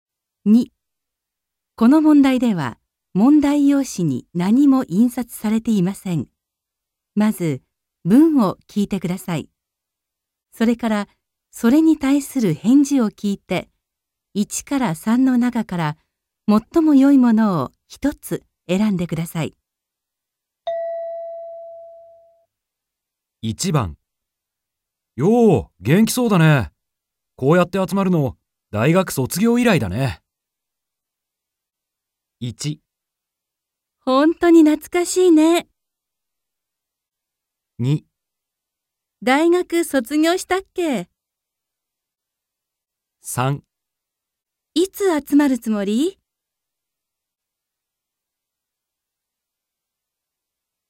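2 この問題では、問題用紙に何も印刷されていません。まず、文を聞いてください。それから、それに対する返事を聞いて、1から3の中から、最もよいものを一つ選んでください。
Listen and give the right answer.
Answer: 本当に懐かしいね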